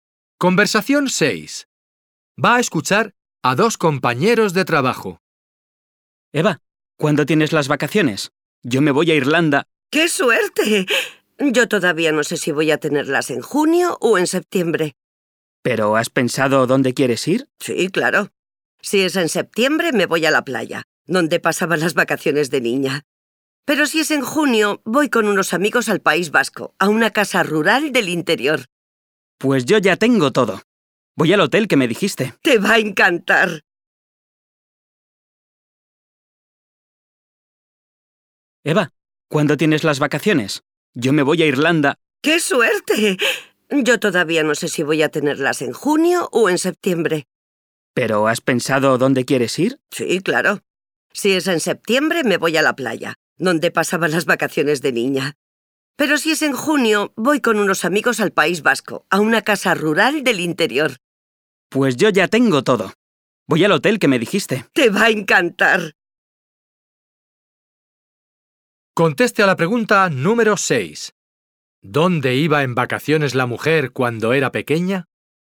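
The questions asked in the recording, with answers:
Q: ¿Dónde iba en vacaciones la mujer cuando era pequeña?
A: A la playa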